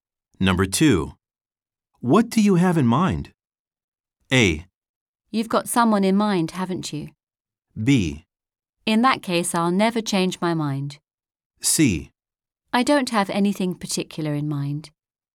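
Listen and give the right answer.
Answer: C: I don't have anything particular in mind.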